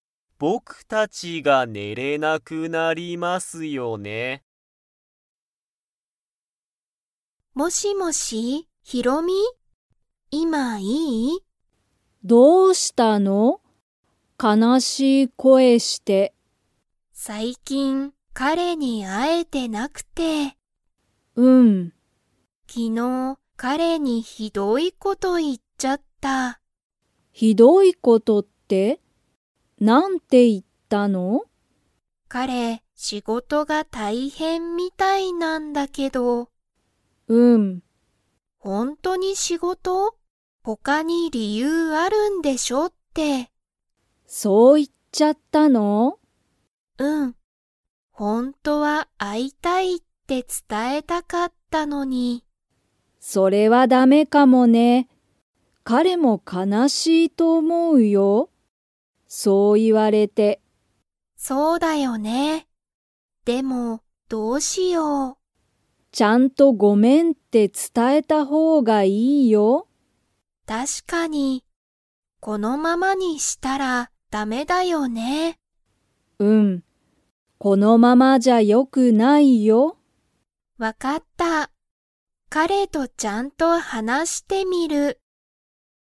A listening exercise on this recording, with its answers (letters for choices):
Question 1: ゆりこは、最近さいきん彼かれに会あえていますか?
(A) はい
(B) いいえ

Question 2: ゆりこは、彼かれとちゃんと みる。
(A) 話はなして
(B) 遊あそんで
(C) メールして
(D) 出でかけて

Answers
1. B
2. A

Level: Level 3